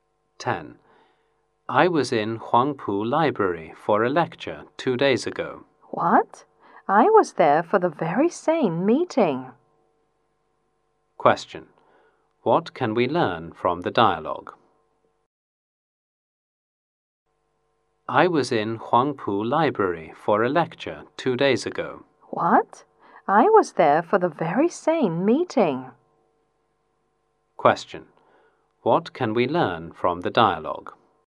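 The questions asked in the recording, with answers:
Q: What can we learn from the dialogue?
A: Both speakers attended the same lecture at Huangpu Library.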